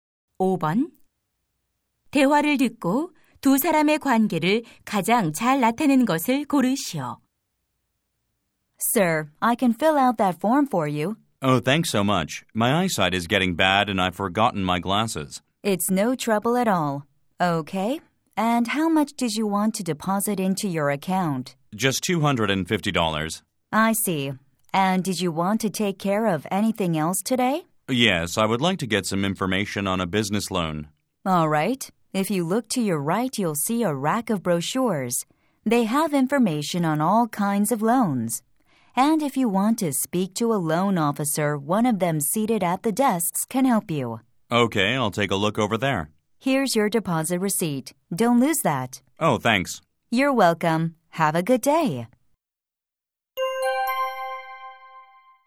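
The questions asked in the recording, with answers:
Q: 대화를 듣고 두 사람의 관계를 가장 잘 나타내는 것을 고르시오.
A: 은행 직원과 고객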